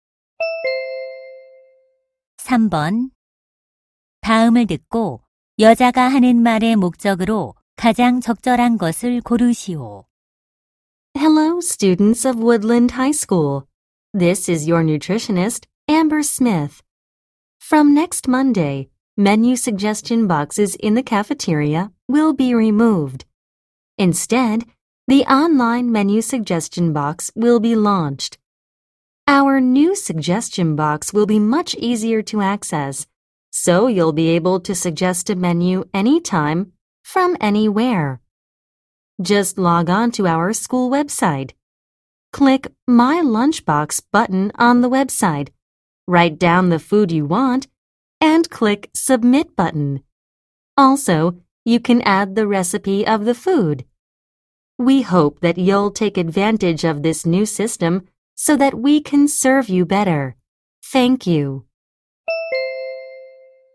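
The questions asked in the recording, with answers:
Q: 다음을 듣고 여자가 하는 말의 목적으로 가장 적절한 것을 고르시오.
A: 온라인 메뉴 건의함 개설을 안내하려고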